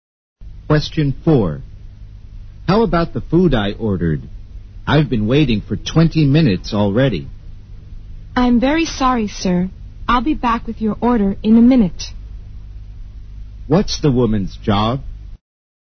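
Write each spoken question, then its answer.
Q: What's the woman's job?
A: A waitress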